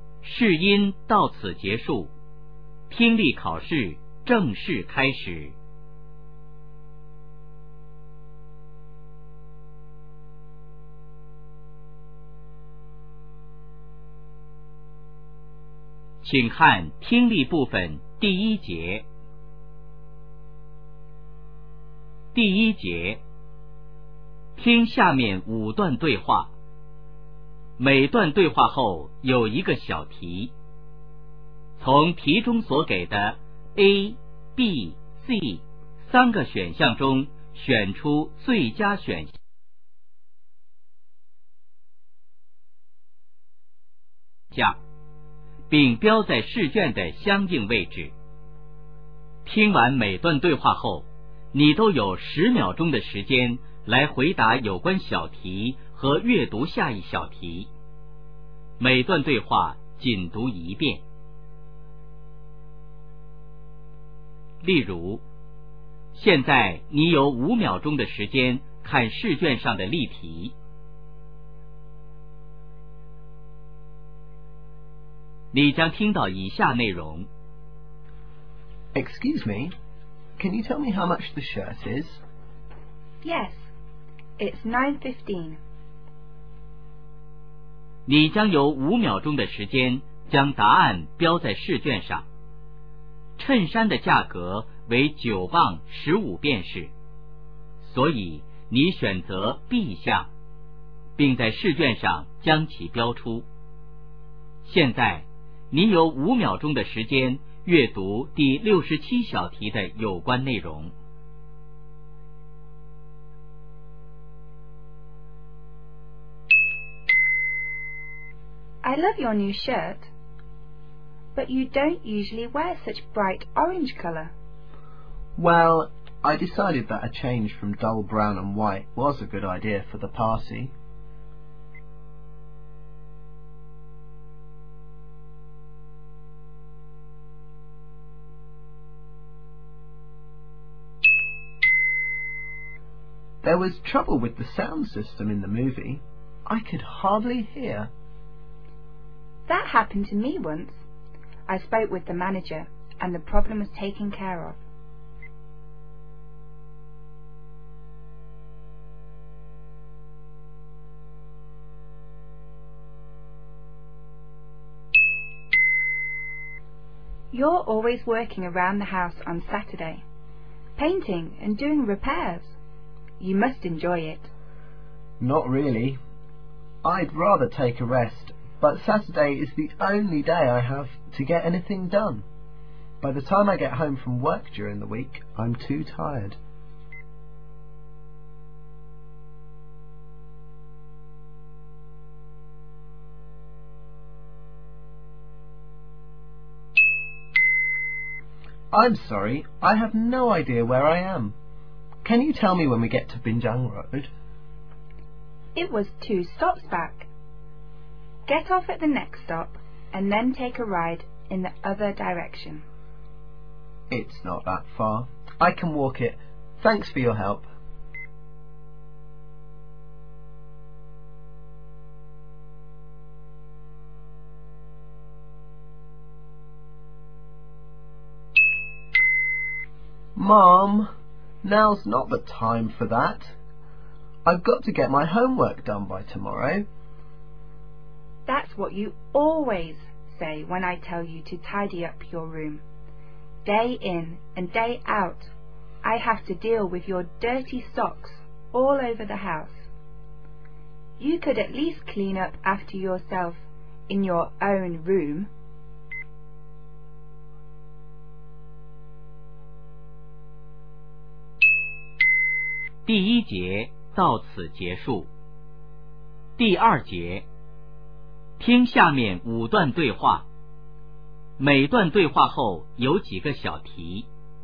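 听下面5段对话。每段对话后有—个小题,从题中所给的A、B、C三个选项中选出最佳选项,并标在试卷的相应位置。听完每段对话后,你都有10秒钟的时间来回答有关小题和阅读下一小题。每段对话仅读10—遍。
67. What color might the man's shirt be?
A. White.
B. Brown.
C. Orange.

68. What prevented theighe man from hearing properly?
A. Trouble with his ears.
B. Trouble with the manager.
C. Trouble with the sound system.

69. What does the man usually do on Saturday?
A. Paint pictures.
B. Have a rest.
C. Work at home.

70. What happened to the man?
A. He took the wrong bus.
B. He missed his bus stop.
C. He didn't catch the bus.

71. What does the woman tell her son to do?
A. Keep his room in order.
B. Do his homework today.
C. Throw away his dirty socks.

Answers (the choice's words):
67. Orange.
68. Trouble with the sound system.
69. Work at home.
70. He missed his bus stop.
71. Keep his room in order.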